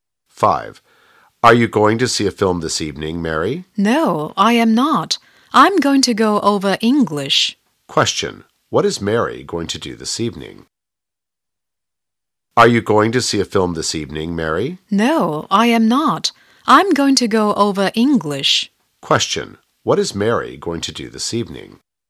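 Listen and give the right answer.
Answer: Go over English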